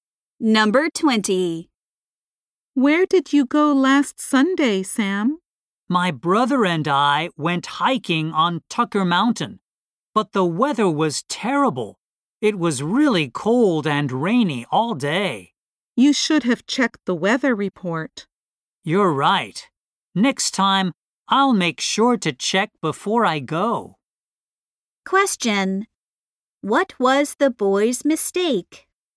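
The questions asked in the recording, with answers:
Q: What was the boy's mistake?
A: He didn't check the weather report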